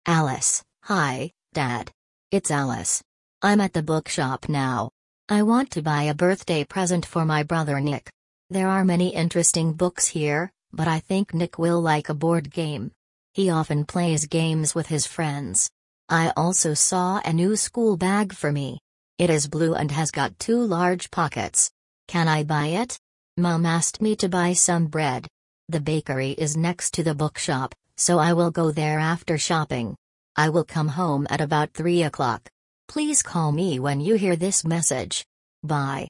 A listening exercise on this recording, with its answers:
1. Who is this message from?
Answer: From Alice to her father.

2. Where is Alice now?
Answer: At the bookshop.

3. What does Alice want to buy for her brother?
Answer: A board game.

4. What colour is the school bag?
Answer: Blue.

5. Where is the bakery?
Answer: Next to the bookshop.

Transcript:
Alice: Hi, Dad! It's Alice. I'm at the bookshop now. I want to buy a birthday present for my brother Nick.
There are many interesting books here, but I think Nick will like a board game. He often plays games with his friends.
I also saw a new school bag for me. It is blue and has got two large pockets. Can I buy it?
Mum asked me to buy some bread. The bakery is next to the bookshop, so I will go there after shopping.
I will come home at about three o'clock. Please call me when you hear this message. Bye!

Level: 4 классе